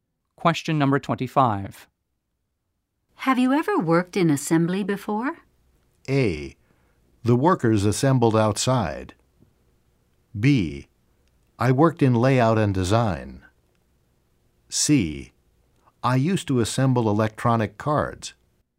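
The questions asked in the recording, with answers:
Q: Have you ever worked in assembly before?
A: C: I used to assemble electronic cards.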